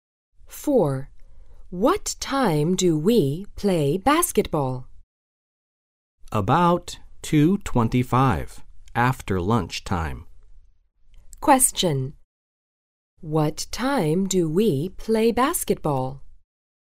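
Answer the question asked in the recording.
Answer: About 2:25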